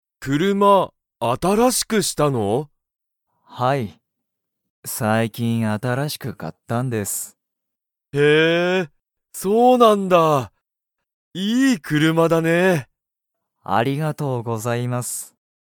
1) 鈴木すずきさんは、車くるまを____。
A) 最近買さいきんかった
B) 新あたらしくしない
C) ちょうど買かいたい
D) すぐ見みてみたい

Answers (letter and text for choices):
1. A) 最近買さいきんかった

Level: Level 1